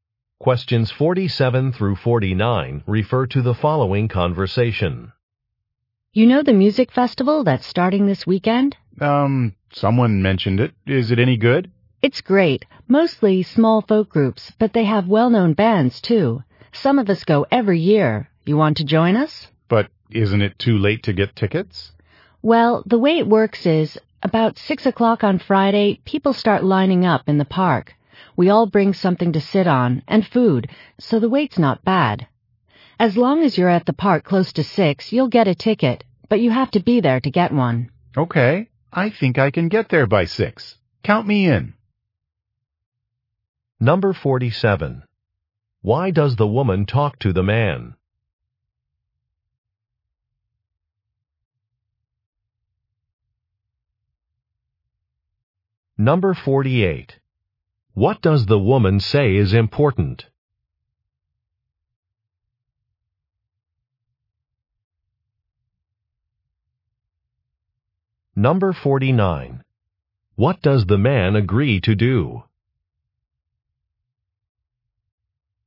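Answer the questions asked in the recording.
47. To invite him to a music festival
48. Being at the park around 6 o'clock to get a ticket
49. Go to the park by 6 on Friday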